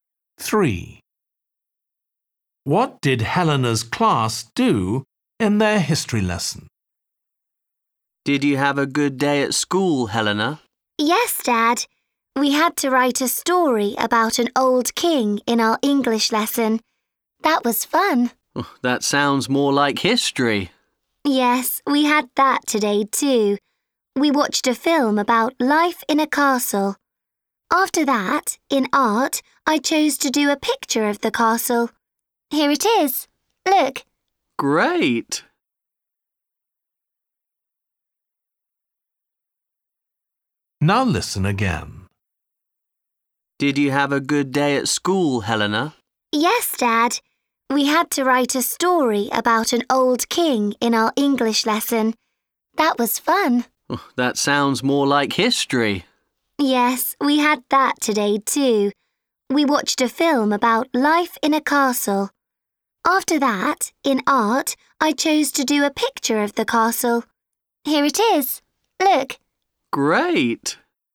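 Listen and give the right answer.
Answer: They watched a film about life in a castle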